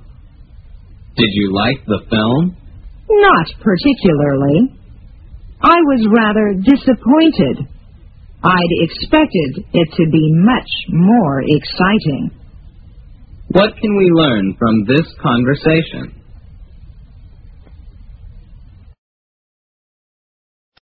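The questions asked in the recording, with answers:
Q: What can we learn from this conversation?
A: The speaker was disappointed with the film; it was less exciting than expected.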